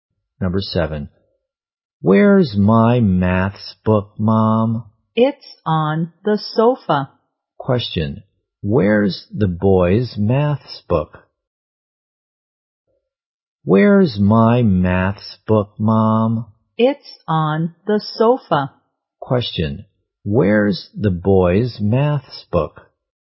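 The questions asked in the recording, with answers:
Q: where's the boy's maths book?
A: On the sofa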